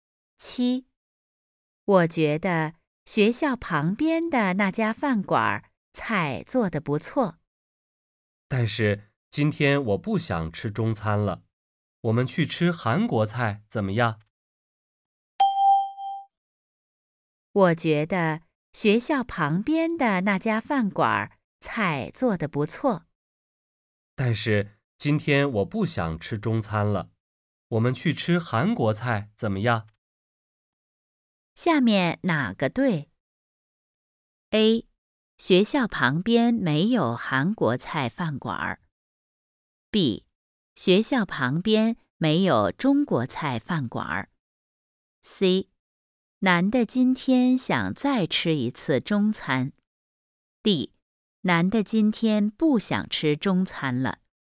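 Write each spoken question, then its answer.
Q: 下面哪个对?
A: D: 男的今天不想吃中餐了。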